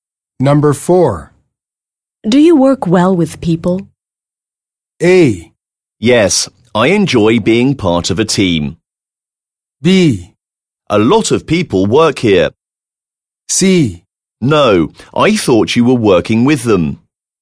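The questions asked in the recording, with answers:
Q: Do you work well with people?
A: A: Yes, I enjoy being part of a team.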